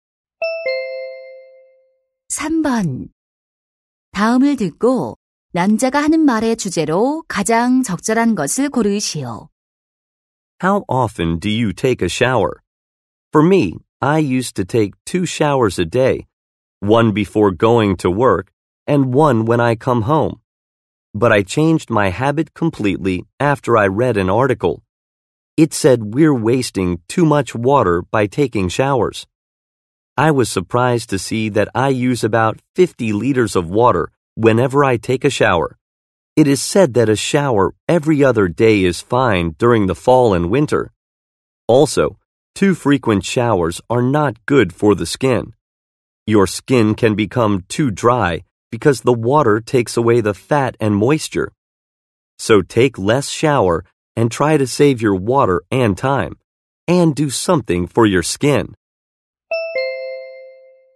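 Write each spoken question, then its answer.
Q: 다음을 듣고 남자가 하는 말의 주제로 가장 적절한 것을 고르시오.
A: 샤워를 덜 자주 해서 물을 아끼고 피부를 보호하자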